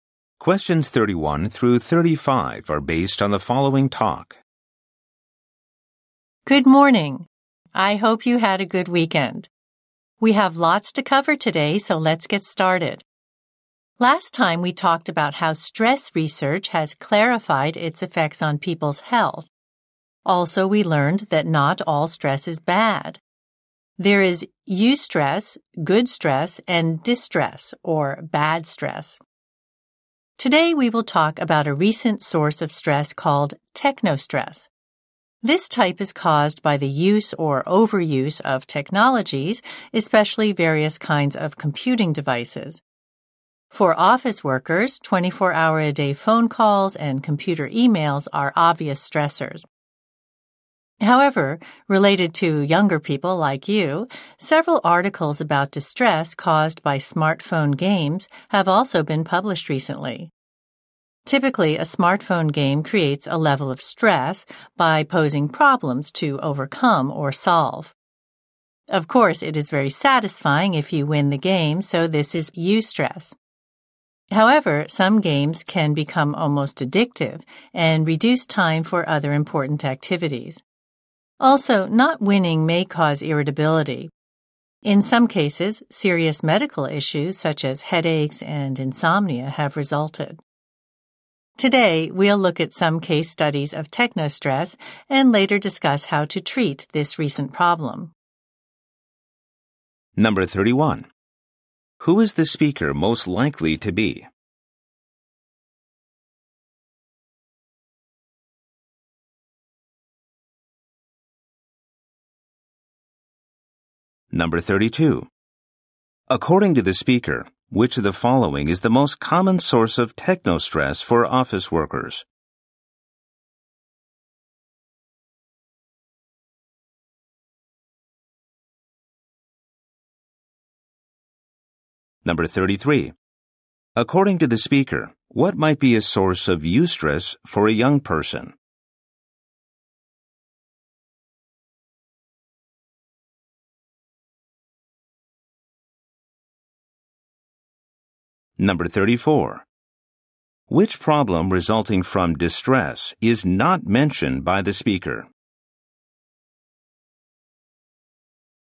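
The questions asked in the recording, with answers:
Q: Who is the speaker most likely to be?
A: A lecturer/teacher

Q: According to the speaker, which of the following is the most common source of technostress for office workers?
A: 24-hour-a-day phone calls and computer emails

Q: According to the speaker, what might be a source of eustress for a young person?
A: Winning a smartphone game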